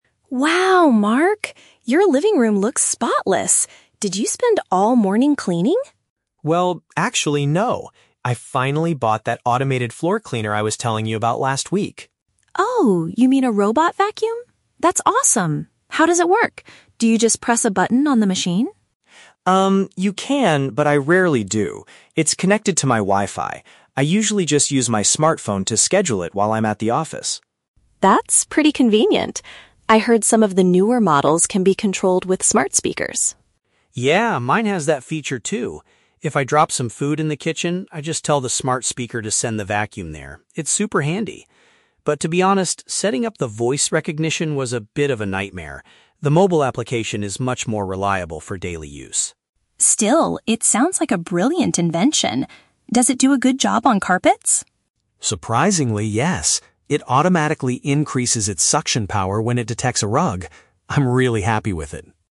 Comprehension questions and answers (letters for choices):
Listen to a conversation between two friends about a new smart home gadget. For each question, choose the correct answer (A, B, or C).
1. How does Mark primarily operate his new device?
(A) By manually pressing the buttons on it.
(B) Through a software program on his mobile phone.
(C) By giving verbal instructions to his smart speaker.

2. How did Mark feel about configuring the voice control feature?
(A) He found the setup process quite frustrating.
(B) He was impressed by how quickly it connected.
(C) He thought it was much easier than using the app.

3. What happens when the machine moves onto a rug?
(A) It sends a notification to the user's phone.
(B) It requires the user to change the settings.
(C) It cleans the area with stronger force.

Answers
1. B
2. A
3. C

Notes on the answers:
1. Mark says, "I usually just use my smartphone to schedule it." Option (B) is a paraphrase of this sentence. Option (A) is a trap; he says "you can, but I rarely do." Option (C) is also a trap; he uses the smart speaker occasionally when he drops food, but the app is his primary ("usually") and "more reliable" method.
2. Mark mentions that setting up the voice recognition was "a bit of a nightmare." Option (A) correctly paraphrases "a nightmare" as "frustrating." Option (B) is not mentioned. Option (C) is a trap; he actually says the exact opposite—the mobile app is more reliable.
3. Mark explains that the vacuum "increases its suction power when it detects a rug." Option (C) uses synonyms ("stronger force") to replace "increases its suction power." Options (A) and (B) sound plausible for smart devices but are completely absent from the audio.

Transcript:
Lisa: Wow, Mark! Your living room looks spotless. Did you spend all morning cleaning?
Mark: Well, actually... no. I finally bought that automated floor cleaner I was telling you about last week.
Lisa: Oh, you mean a robot vacuum? That's awesome! How does it work? Do you just press a button on the machine?
Mark: Um, you can, but I rarely do. It's connected to my Wi-Fi. I usually just use my smartphone to schedule it while I'm at the office.
Lisa: That's pretty convenient. I heard some of the newer models can be controlled with smart speakers.
Mark: Yeah, mine has that feature too. If I drop some food in the kitchen, I just tell the smart speaker to send the vacuum there. It's super handy. But, to be honest, setting up the voice recognition was a bit of a nightmare. The mobile application is much more reliable for daily use.
Lisa: Still, it sounds like a brilliant invention. Does it do a good job on carpets?
Mark: Surprisingly, yes. It automatically increases its suction power when it detects a rug. I'm really happy with it.